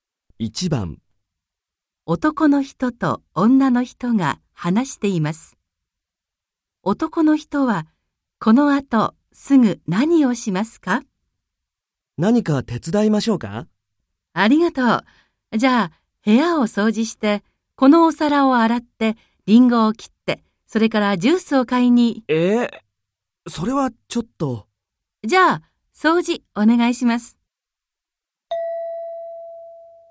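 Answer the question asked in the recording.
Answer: 部屋を掃除する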